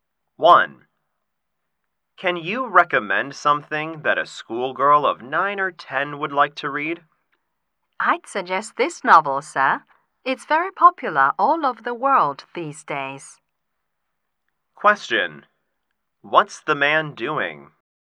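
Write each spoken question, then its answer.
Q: What's the man doing?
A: Recommending a novel for a schoolgirl, probably as a bookstore clerk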